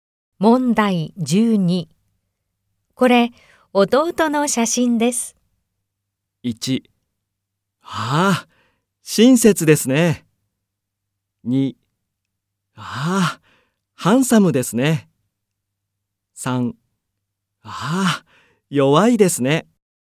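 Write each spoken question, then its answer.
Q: これ、弟の写真です。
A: 2: ああ、ハンサムですね。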